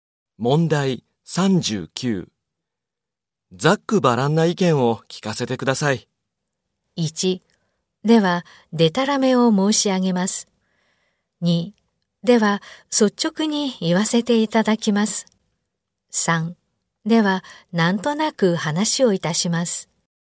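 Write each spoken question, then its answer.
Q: ざっくばらんな意見を聞かせてください。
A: 2: では率直に言わせていただきます。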